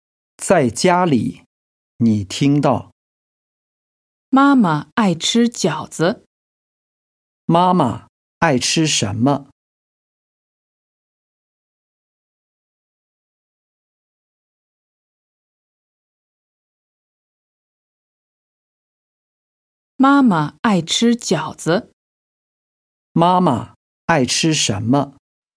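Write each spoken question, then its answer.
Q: 妈妈爱吃什么?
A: 饺子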